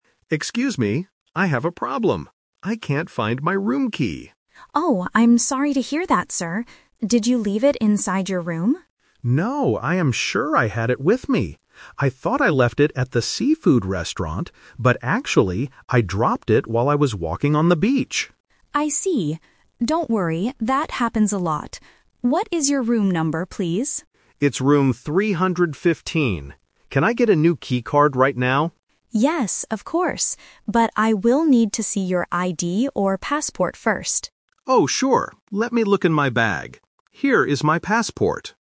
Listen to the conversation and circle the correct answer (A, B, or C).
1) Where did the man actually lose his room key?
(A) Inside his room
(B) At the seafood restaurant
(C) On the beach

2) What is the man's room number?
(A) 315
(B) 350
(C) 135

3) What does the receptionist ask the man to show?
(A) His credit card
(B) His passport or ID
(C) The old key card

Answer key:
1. On the beach
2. 315
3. His passport or ID

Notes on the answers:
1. This is "The Twist". The receptionist asks if he left it inside his room (Option A - Trap), and the guest thought he left it at the restaurant (Option B - Trap). However, he confirms, "actually, I dropped it while I was walking on the beach."
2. The guest clearly says, "It's room 315" (Three-fifteen). Option (B) is a trap because "fifty" and "fifteen" sound similar. Option (C) uses the same numbers but in the wrong order.
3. The receptionist says, "I will need to see your ID or passport first." Option (A) is a plausible item to ask for at a hotel, but it is not mentioned. Option (C) is a trap because the old key card is exactly what the man lost.

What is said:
Guest (Mr. Smith): Excuse me, I have a problem. I can't find my room key.
Receptionist: Oh, I'm sorry to hear that, sir. Did you leave it inside your room?
Guest: No, I am sure I had it with me. I thought I left it at the seafood restaurant, but actually, I dropped it while I was walking on the beach.
Receptionist: I see. Don't worry, that happens a lot. What is your room number, please?
Guest: It's room 315. Can I get a new key card right now?
Receptionist: Yes, of course. But I will need to see your ID or passport first.

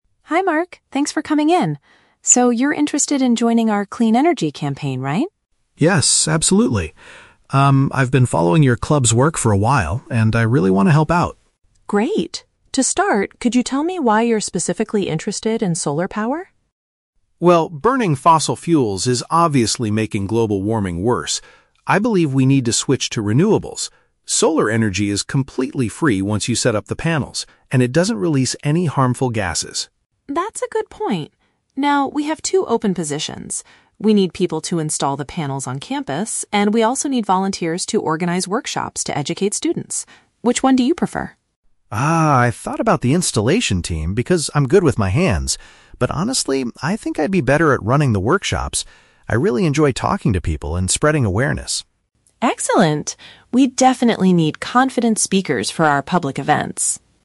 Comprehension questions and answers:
Listen to an interview for a volunteer position and choose the correct answer (A, B, or C) for each question.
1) What does Mark consider to be a major advantage of solar energy?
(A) It completely replaces the need for fossil fuels immediately.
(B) It creates no dangerous pollution for the environment.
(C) It lowers the cost of manufacturing solar equipment.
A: It creates no dangerous pollution for the environment.

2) Which volunteer position does Mark ultimately choose to do?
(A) Putting the equipment on the university buildings.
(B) Raising awareness by leading educational sessions.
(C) Designing posters for the environmental club.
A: Raising awareness by leading educational sessions.

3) Why does Mark feel he is a good fit for his chosen role?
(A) Because he has a lot of technical experience with solar panels.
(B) Because he has organized many campus events before.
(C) Because he takes pleasure in communicating with others.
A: Because he takes pleasure in communicating with others.

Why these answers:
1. Mark says that solar energy "doesn't release any harmful gases." (Paraphrasing: no dangerous pollution = doesn't release harmful gases). Why the trap is wrong: Option (A) is a trap. He mentions "fossil fuels," but he says they make global warming worse and we need to switch away from them; he does not say solar power replaces them immediately. Option (C) is plausible but not mentioned.
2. Mark says he would be better at "running the workshops" and "spreading awareness" to educate students. (Paraphrasing: leading educational sessions = running workshops / educate students). Why the trap is wrong: Option (A) is the trap. Mark initially says, "I thought about the installation team" (putting equipment on buildings), but he uses the word "but" to reject it because he prefers the other role. Option (C) is not mentioned.
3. Mark chooses the workshop role because he says, "I really enjoy talking to people." (Paraphrasing: takes pleasure in = really enjoy; communicating = talking). Why the trap is wrong: Option (A) is a trap. He mentions he is "good with my hands" (which sounds like technical experience), but this was his reason for considering the installation role, which he ultimately rejected. Option (B) is a plausible reason for a volunteer, but it is never mentioned in the audio.

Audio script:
Lisa: Hi Mark, thanks for coming in. So, you're interested in joining our Clean Energy Campaign, right?
Mark: Yes, absolutely. Um, I've been following your club's work for a while, and I really want to help out.
Lisa: Great! To start, could you tell me why you're specifically interested in solar power?
Mark: Well, burning fossil fuels is obviously making global warming worse. I believe we need to switch to renewables. Solar energy is completely free once you set up the panels, and it doesn't release any harmful gases.
Lisa: That's a good point. Now, we have two open positions. We need people to install the panels on campus, and we also need volunteers to organize workshops to educate students. Which one do you prefer?
Mark: Ah, I thought about the installation team because I'm good with my hands, but honestly, I think I'd be better at running the workshops. I really enjoy talking to people and spreading awareness.

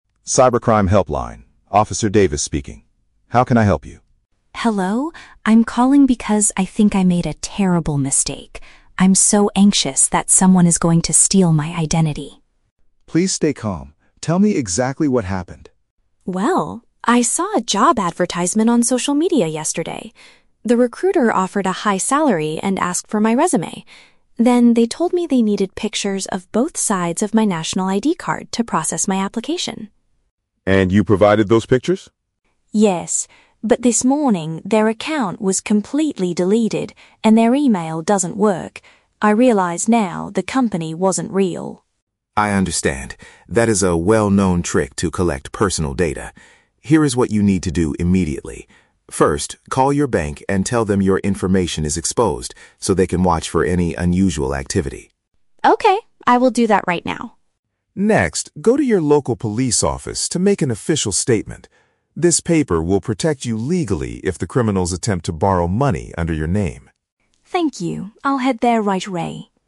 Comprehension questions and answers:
Listen to the telephone conversation between a job applicant and a police officer. Choose the correct answer (A, B, or C) for each question.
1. Why is the caller feeling so anxious?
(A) She lost her physical wallet on her way to an interview.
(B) She accidentally transferred money to a fake recruiter.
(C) She shared her private documents with a scammer.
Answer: She shared her private documents with a scammer.

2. How did the applicant realize she was tricked?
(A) The person who posted the job disappeared from the internet.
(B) The employer asked for her banking passwords.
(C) The police called to warn her about the social media post.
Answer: The person who posted the job disappeared from the internet.

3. What is the SECOND piece of advice the officer gives?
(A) To temporarily lock all of her credit cards.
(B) To get a formal written record of the incident from the authorities.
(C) To apply for a brand new identification card immediately.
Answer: To get a formal written record of the incident from the authorities.

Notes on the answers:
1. The applicant says she provided "pictures of both sides of my national ID card" to a company that "wasn't real." This matches option C: sharing private documents with a scammer. Why the traps are wrong: Option A is plausible but never mentioned (she didn't lose her wallet, she sent photos). Option B is a trap because the audio mentions a "fake" situation (company wasn't real), but she didn't send them any money, only her ID.
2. She realized it was a fake job because "their account was completely deleted, and their email doesn't work." This means the person disappeared from the internet. Why the traps are wrong: Option B is a trap; the officer mentions the "bank" later, but the scammer never asked for her bank passwords. Option C is incorrect because she called the police, the police didn't call her.
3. The officer's first advice

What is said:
Officer: Cybercrime Helpline, Officer Davis speaking. How can I help you?
Applicant: Hello. I'm calling because I think I made a terrible mistake. I'm so anxious that someone is going to steal my identity.
Officer: Please stay calm. Tell me exactly what happened.
Applicant: Well, I saw a job advertisement on social media yesterday. The recruiter offered a high salary and asked for my resume. Then, they told me they needed pictures of both sides of my national ID card to process my application.
Officer: And you provided those pictures?
Applicant: Yes. But this morning, their account was completely deleted, and their email doesn't work. I realize now the company wasn't real.
Officer: I understand. That is a well-known trick to collect personal data. Here is what you need to do immediately. First, call your bank and tell them your information is exposed, so they can watch for any unusual activity.
Applicant: Okay, I will do that right now.
Officer: Next, go to your local police office to make an official statement. This paper will protect you legally if the criminals attempt to borrow money under your name.

